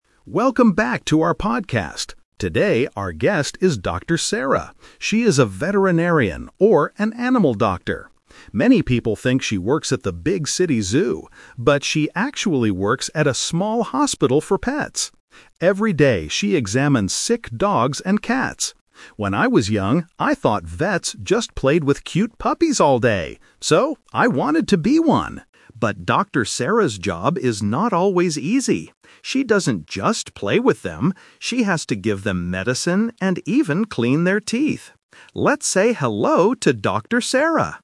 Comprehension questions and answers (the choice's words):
Listen to a podcast host introducing a guest. Circle the correct answer (A, B, or C).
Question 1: Where does Dr. Sarah work?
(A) At the city zoo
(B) At a pet hospital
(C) At a pet shop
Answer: At a pet hospital

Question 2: What did the host want to be when he was young?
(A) A veterinarian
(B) A podcast host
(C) A zoo worker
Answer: A veterinarian

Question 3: What does Dr. Sarah actually have to do at work?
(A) She plays with cute puppies all day.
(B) She buys sick dogs and cats.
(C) She gives medicine to the animals.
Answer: She gives medicine to the animals.

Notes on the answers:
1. The host clearly states, "But she actually works at a small hospital for pets." Option (A) is the trap: many people think she works at the big city zoo, but she doesn't. Option (C) is a plausible place with pets, but it is not mentioned.
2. The host says, "When I was young, I thought vets just played with cute puppies all day. So, I wanted to be one!" (one = a vet/veterinarian). Option (B) is what he is now, not what he wanted to be when he was young. Option (C) is a trap related to the zoo mentioned earlier.
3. The host explains that her job is not always easy: "She has to give them medicine and even clean their teeth." Option (A) is the trap: the host thought vets did this, but he says "She doesn't just play with them." Option (B) is a plausible guess but she examines them, she doesn't buy them.

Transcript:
Explanation: The host clearly states, "But she actually works at a small hospital for pets." Option (A) is the trap: many people think she works at the big city zoo, but she doesn't.
2 Correct Answer: (A) A veterinarian
But she actually works at a small hospital for pets. Every day, she examines sick dogs and cats. When I was young, I thought vets just played with cute puppies all day. So, I wanted to be one! But Dr. Sarah's job is not always easy. She doesn't just play with them. She has to give them medicine and even clean their teeth. Let's say hello to Dr. Sarah!

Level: A2